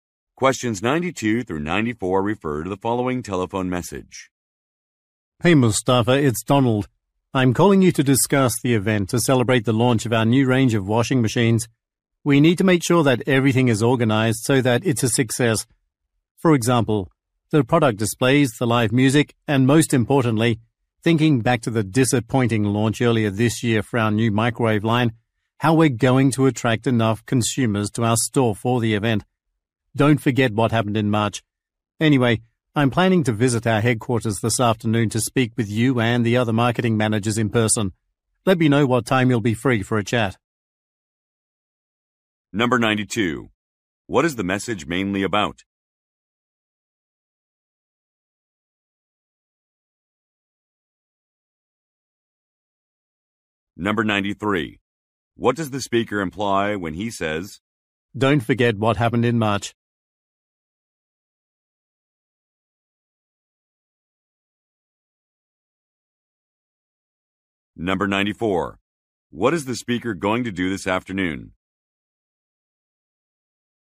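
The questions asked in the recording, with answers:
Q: What is the message mainly about?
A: A product launch event

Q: What is the speaker going to do this afternoon?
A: Visit headquarters to meet managers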